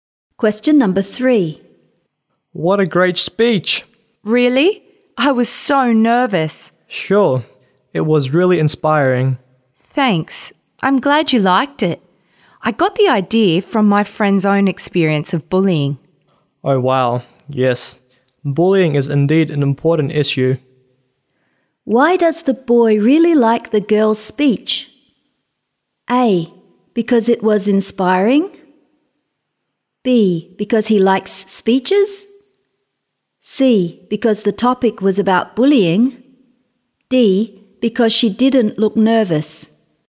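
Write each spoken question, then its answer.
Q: Why does the boy really like the girl's speech?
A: A: Because it was inspiring.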